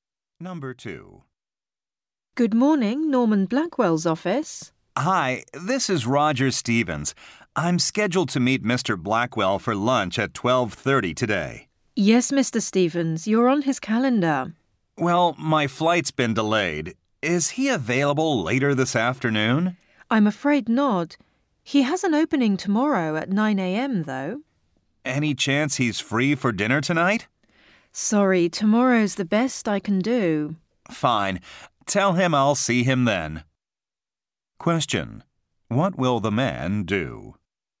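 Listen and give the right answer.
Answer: Meet Mr. Blackwell tomorrow at 9 a.m.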